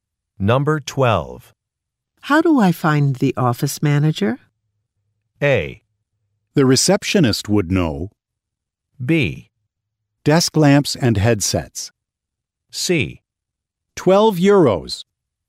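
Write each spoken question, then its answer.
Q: How do I find the office manager?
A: A: The receptionist would know.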